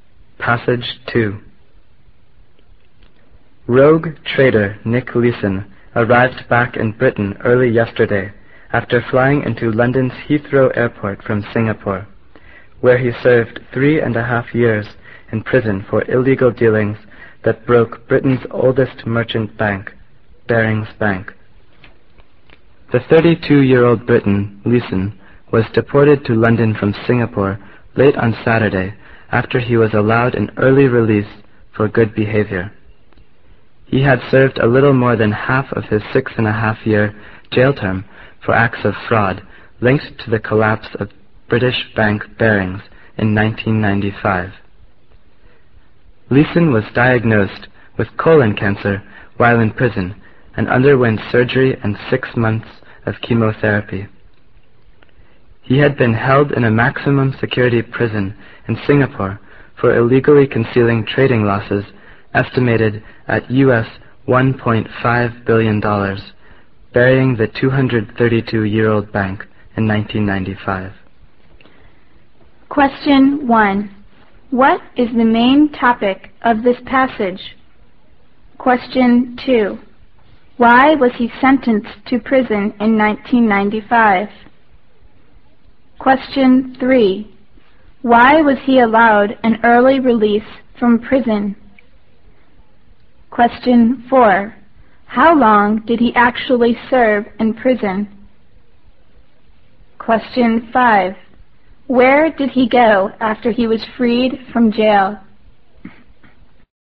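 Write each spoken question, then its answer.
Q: What is the main topic of this passage?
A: Nick Leeson's return to Britain after his release from a Singapore prison

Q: Why was he sentenced to prison in 1995?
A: For fraud: illegally hiding trading losses that brought down Barings Bank

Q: Why was he allowed an early release from prison?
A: For good behavior

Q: How long did he actually serve in prison?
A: 3.5 years

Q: Where did he go after he was freed from jail?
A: Back to Britain (London)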